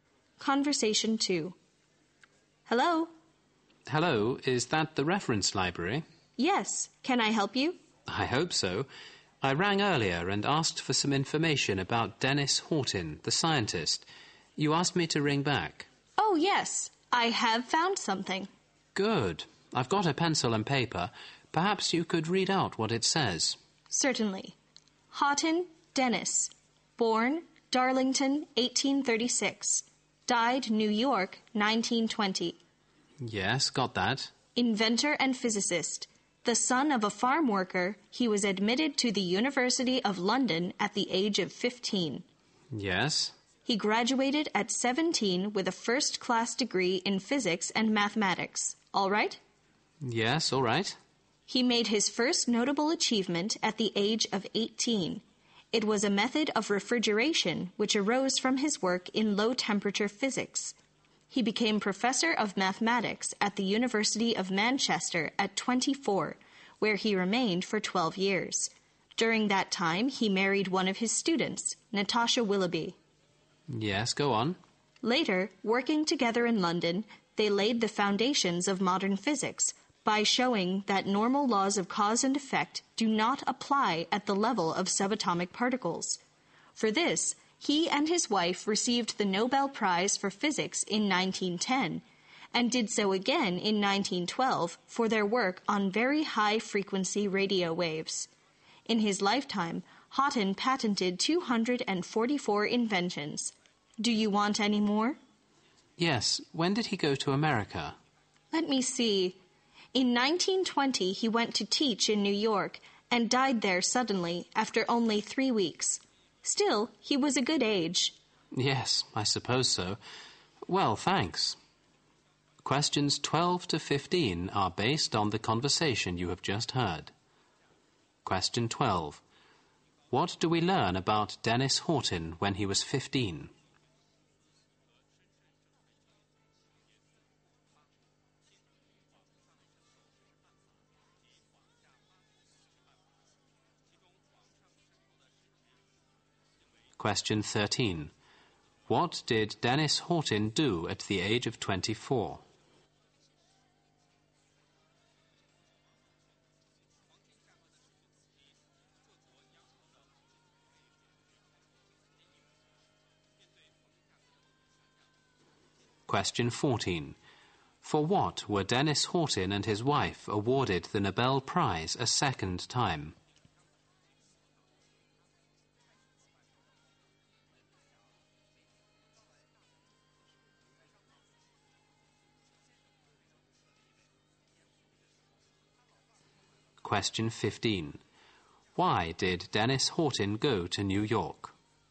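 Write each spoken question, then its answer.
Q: What do we learn about Dennis Horton when he was 15?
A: He was admitted to the University of London.

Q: What did Dennis Horton do at the age of 24?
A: He became professor of mathematics at the University of Manchester.

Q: For what were Dennis Horton and his wife awarded the Nobel Prize a second time?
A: Their work on very high-frequency radio waves.

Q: Why did Dennis Horton go to New York?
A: To teach there.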